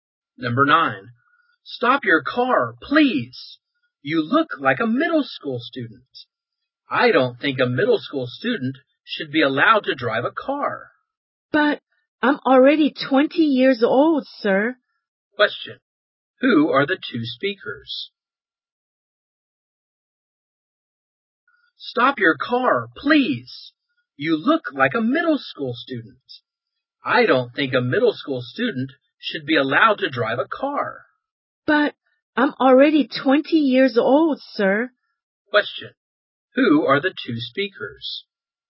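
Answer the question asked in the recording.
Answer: A police officer and a driver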